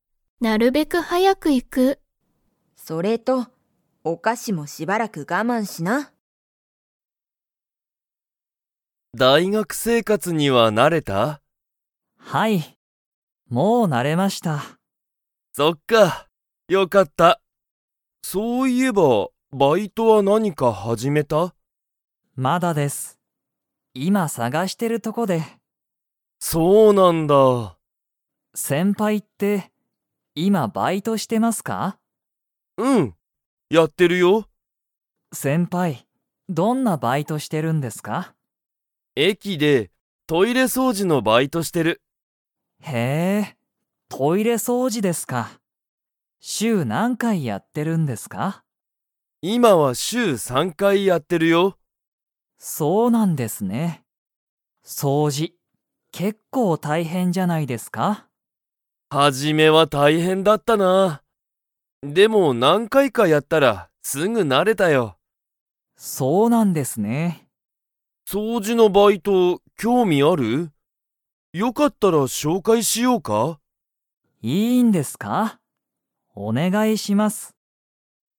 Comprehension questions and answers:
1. ナオキは、大学だいがく生活せいかつに 。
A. 慣なれた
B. 慣なれていない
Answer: A. 慣なれた

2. ケントは、どこでトイレ掃除そうじのバイトをしていますか?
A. 大学だいがく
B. 会社かいしゃ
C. 公園こうえん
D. 駅えき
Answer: D. 駅えき

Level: Level 4

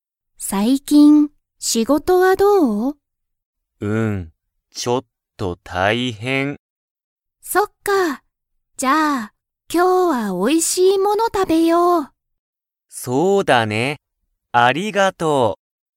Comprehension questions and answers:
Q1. 最近(さいきん)、マナブの仕事(しごと)は、ちょっと____。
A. きれい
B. おいしい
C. 大変(たいへん)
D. 新(あたら)しい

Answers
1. C. 大変(たいへん)

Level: Level 1

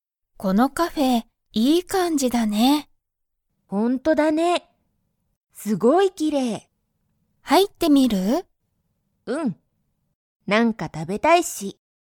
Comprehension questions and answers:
マリエとアズサは、カフェに入(はい)りますか?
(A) はい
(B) いいえ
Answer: (A) はい

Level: Level 1

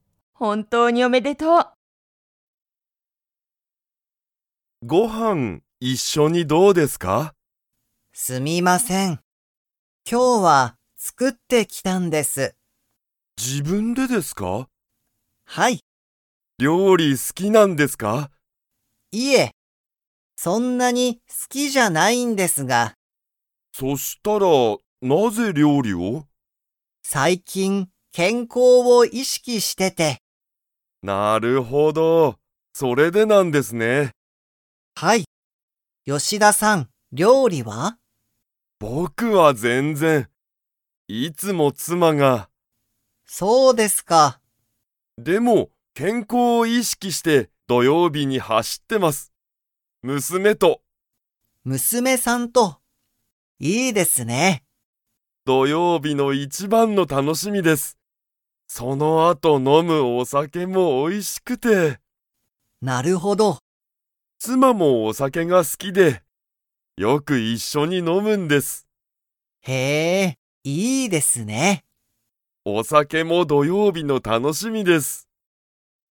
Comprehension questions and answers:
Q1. 山口やまぐちさんは、料理りょうりが 。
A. とても好すきだ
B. そんなに好すきじゃない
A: B. そんなに好すきじゃない

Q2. 吉田(よしだ)さんは、土曜日どようびに誰だれと走はしっていますか?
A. 山口やまぐちさん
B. 友達ともだち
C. 妻つま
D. 娘むすめ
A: D. 娘むすめ

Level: Level 3

